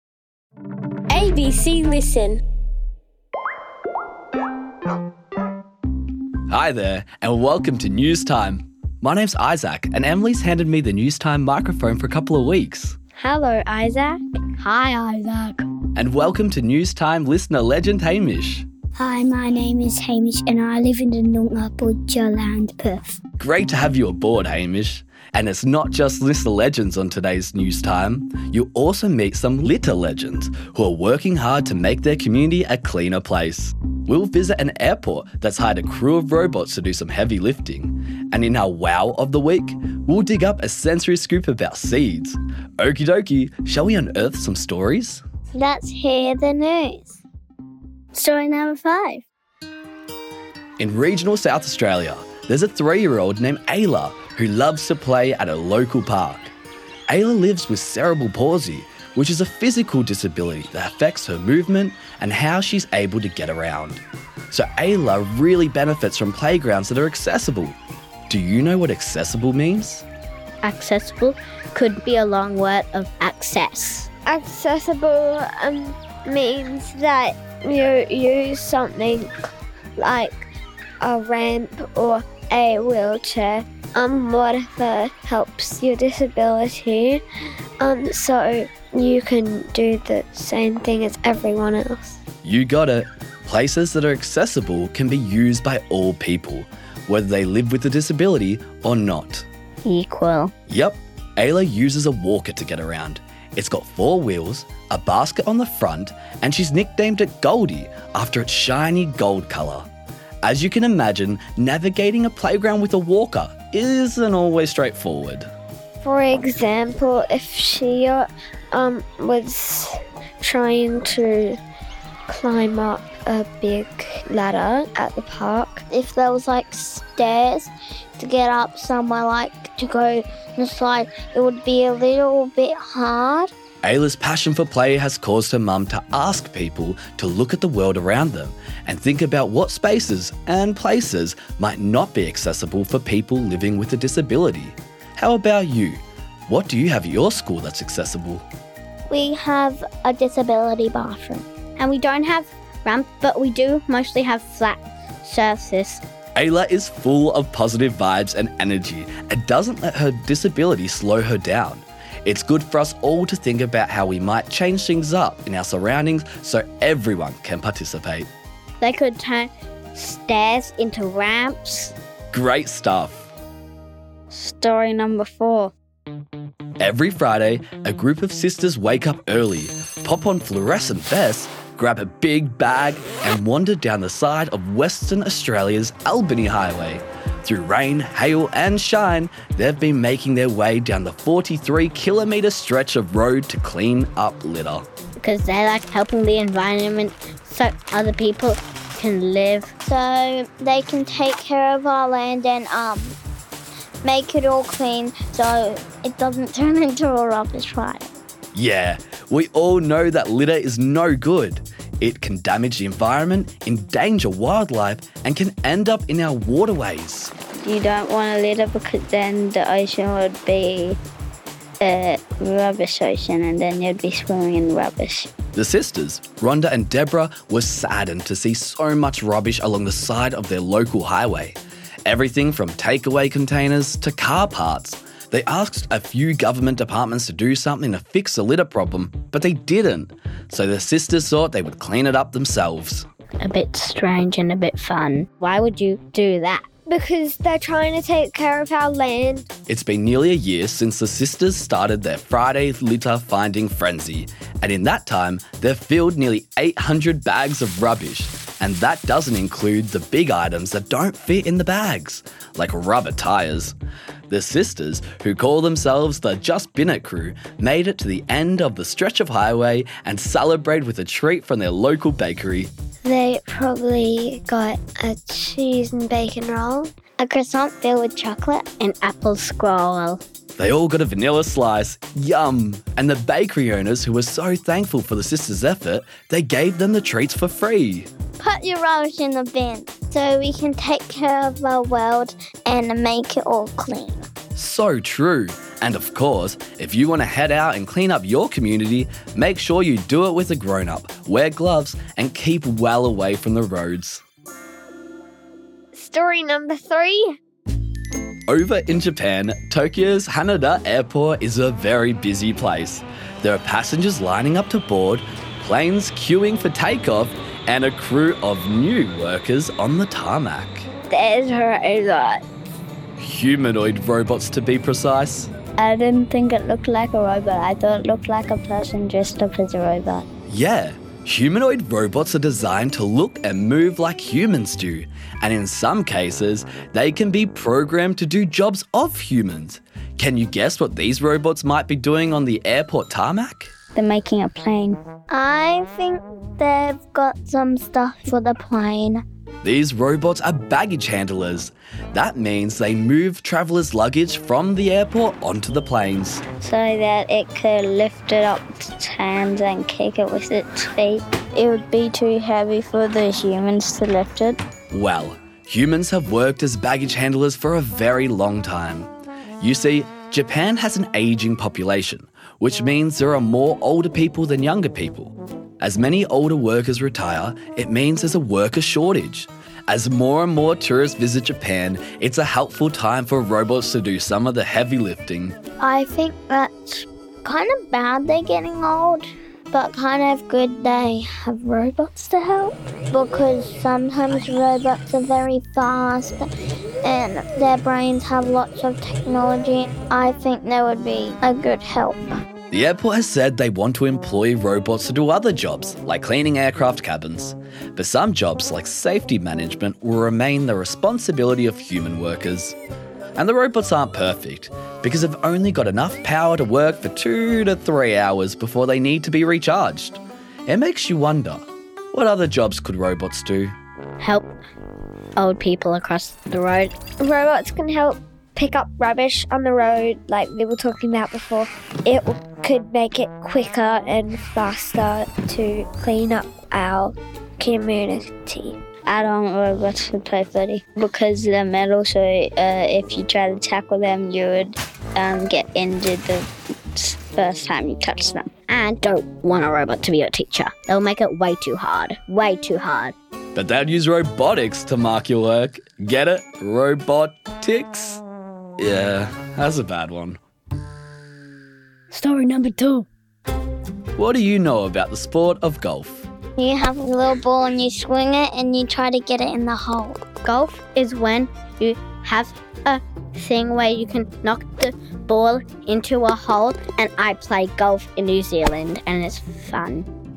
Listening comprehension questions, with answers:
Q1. What nickname has Ayla given her walking frame?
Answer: Goldie